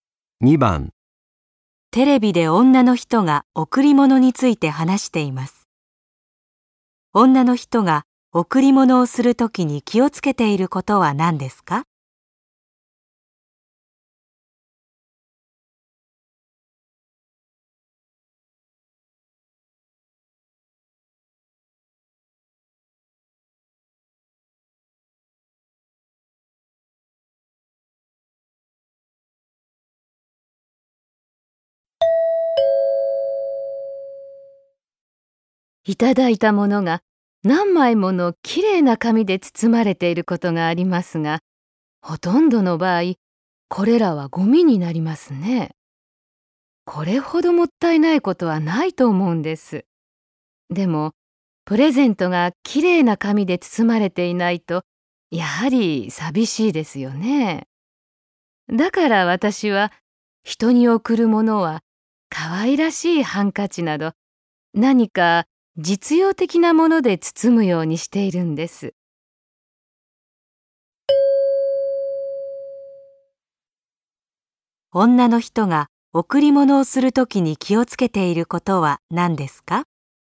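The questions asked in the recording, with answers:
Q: 女の人が贈り物をするときに気をつけていることは何ですか?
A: ハンカチなど実用的なもので包むこと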